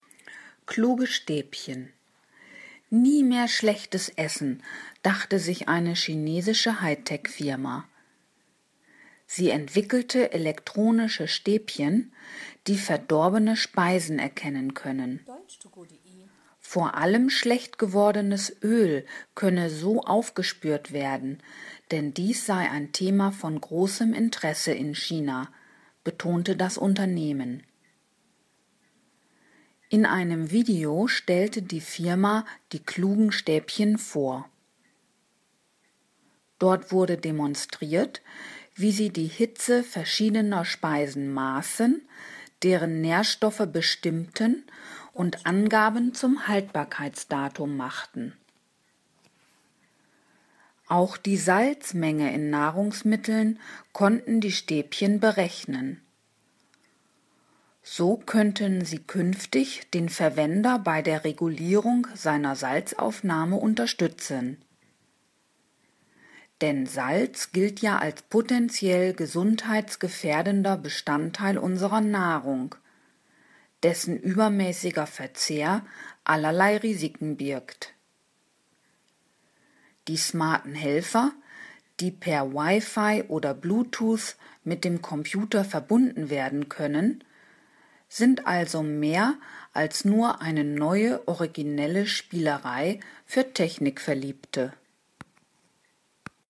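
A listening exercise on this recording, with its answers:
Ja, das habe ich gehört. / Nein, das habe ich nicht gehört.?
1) Eine japanische Firma hat elektronische Stäbchen entwickelt, die verdorbene Speisen erkennen können.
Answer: Nein, das habe ich nicht gehört.

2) Die elektronischen Stäbchen können z.B. Essen auf nicht mehr genießbares Öl untersuchen.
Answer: Ja, das habe ich gehört.

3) Die Entwickler stellten die Stäbchen auf einer großen Konferenz vor.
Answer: Nein, das habe ich nicht gehört.

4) Die Stäbchen können feststellen, wie heiß eine Speise ist.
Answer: Ja, das habe ich gehört.

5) Der Gehalt an Nährstoffen und auch das Datum der Haltbarkeit von Speisen lassen sich mit den elektronischen Stäbchen messen.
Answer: Ja, das habe ich gehört.

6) Besonders die Kalziummenge in Nahrungsmitteln können die Stäbchen ermitteln.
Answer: Nein, das habe ich nicht gehört.

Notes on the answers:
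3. Im Text wird nur eine Videopräsentation genannt, aber kein Ort.
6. Der Text hebt hervor, dass sie auch die Menge an Salz bestimmen können.

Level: B2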